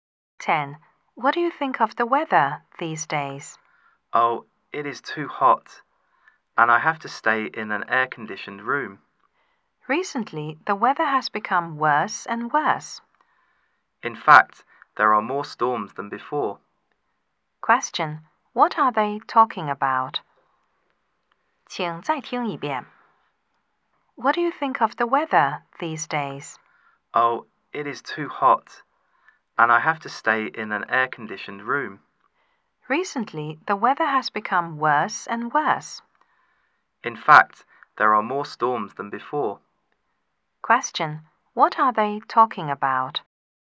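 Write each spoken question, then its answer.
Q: What are they talking about?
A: The weather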